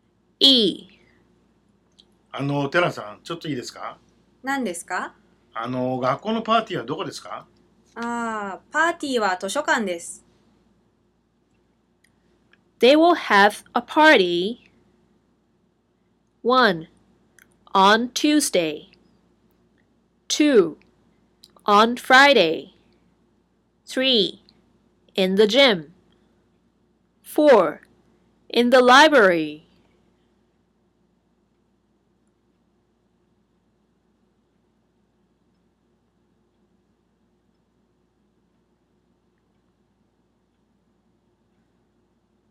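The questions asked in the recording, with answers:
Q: They will have a party 1 on Tuesday 2 on Friday 3 in the gym 4 in the library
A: 4: in the library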